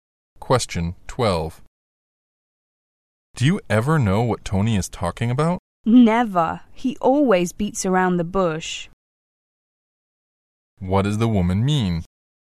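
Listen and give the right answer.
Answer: Tony never gets to the point, so she never understands him.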